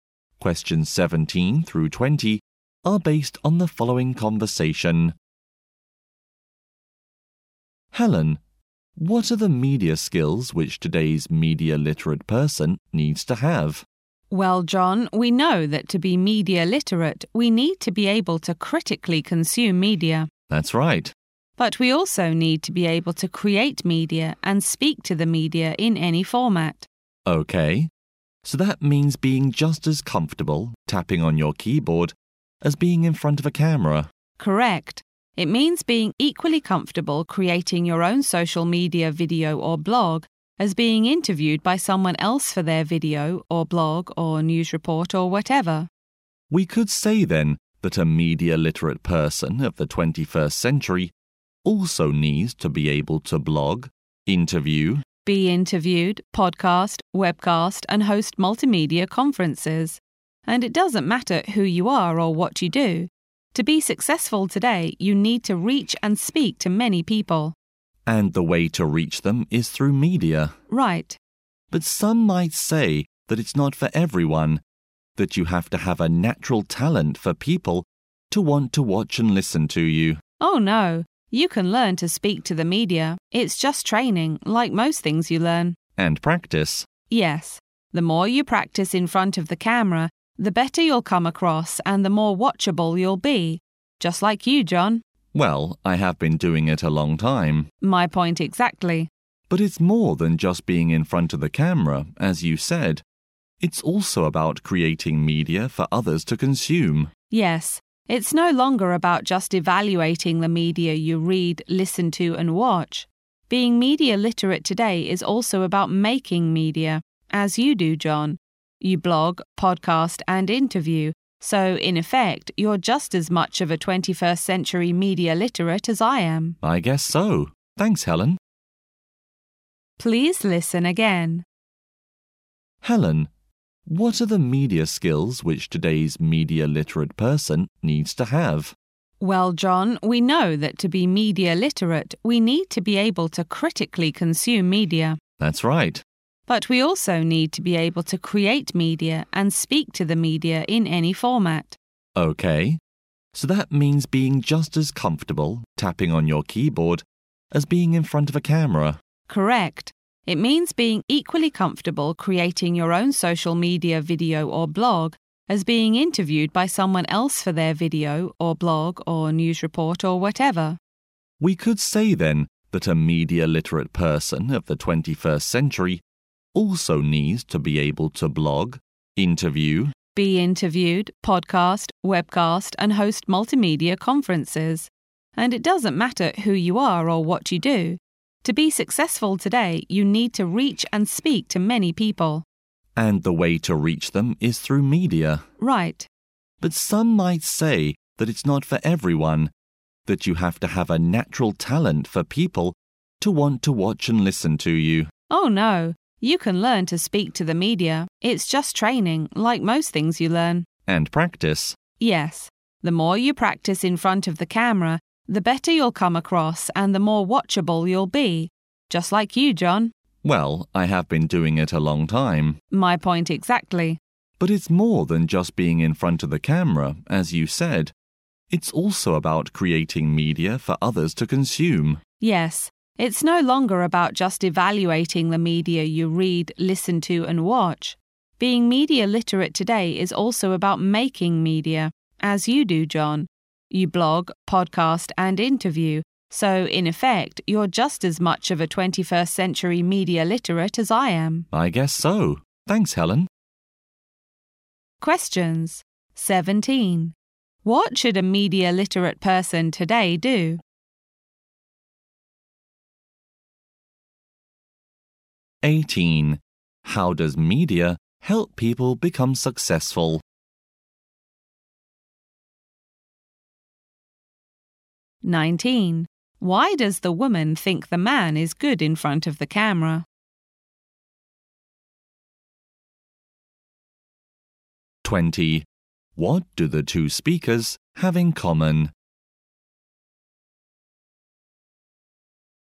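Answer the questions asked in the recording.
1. Critically consume media, create media and speak to the media
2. It lets them reach and speak to many people.
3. He has practiced for a long time.
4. Both are 21st-century media literates who create media.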